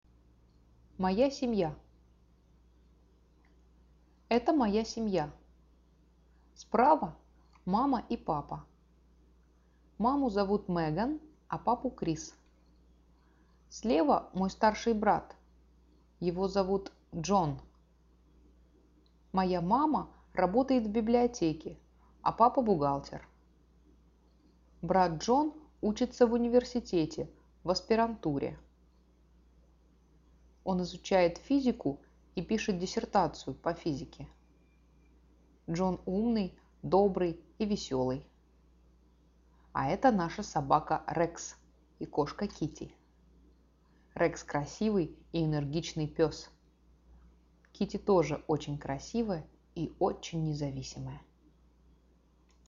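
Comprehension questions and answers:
Now listen to the story and click on the statements that are TRUE.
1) Sara's mom works at university.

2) Sara's mom works in the library.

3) Sara's dad works in the library.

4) Sara's dad is an accountant.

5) Sara has a brother.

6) Sara has a cat.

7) Sara has a dog.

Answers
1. False
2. True
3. False
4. True
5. True
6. True
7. True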